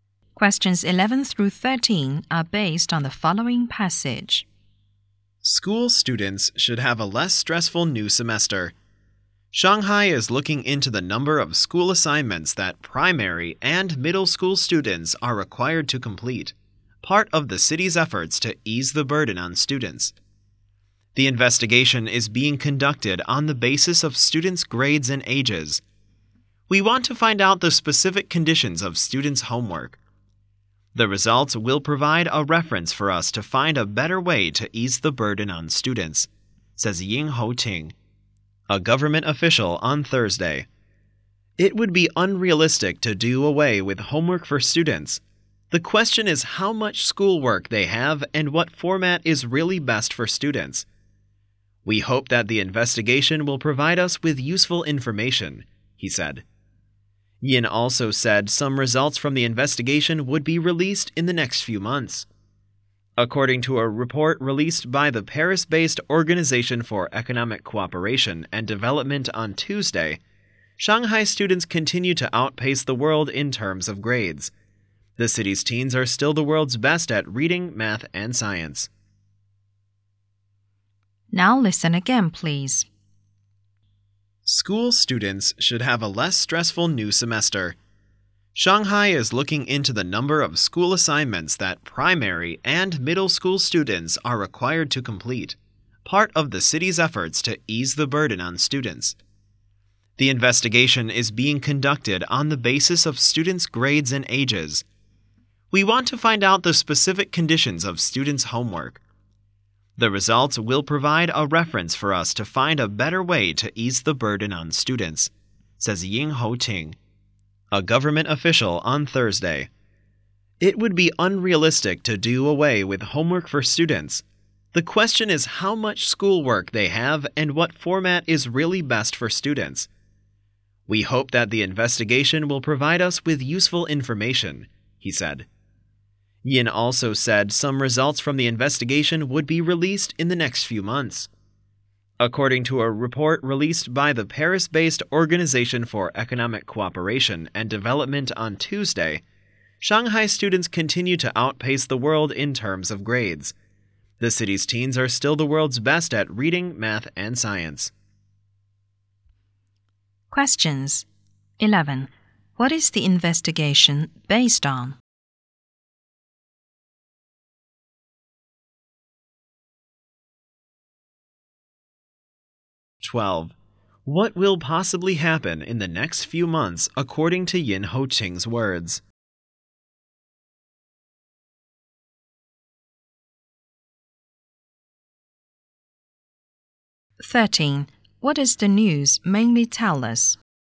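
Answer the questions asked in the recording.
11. Students' grades and ages
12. Some results of the investigation will be released
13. Shanghai is investigating students' homework to ease their burden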